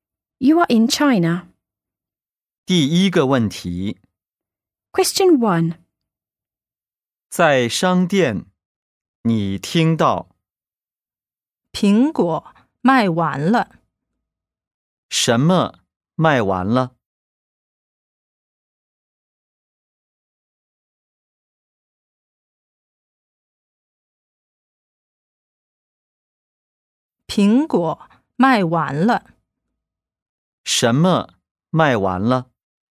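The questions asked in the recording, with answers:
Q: 什么卖完了?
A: 苹果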